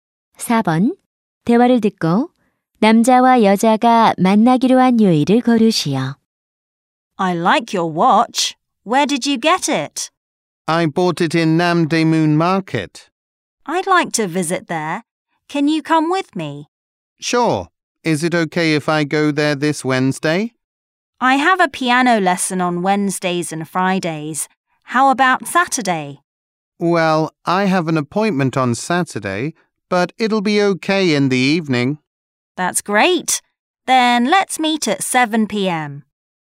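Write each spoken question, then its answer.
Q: 대화를 듣고 남자와 여자가 만나기로 한 요일을 고르시오.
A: 토요일 (저녁 7시)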